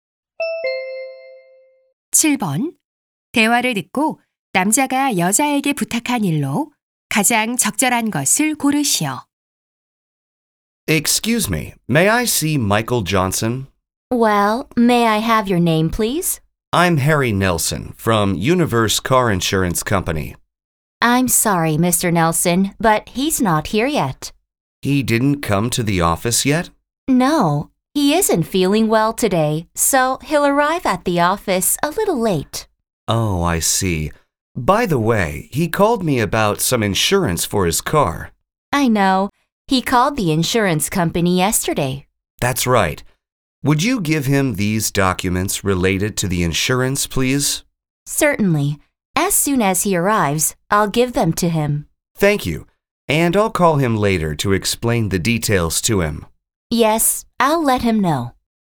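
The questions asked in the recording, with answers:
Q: 대화를 듣고 남자가 여자에게 부탁한 일로 가장 적절한 것을 고르시오.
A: Michael Johnson에게 보험 관련 서류를 전달하기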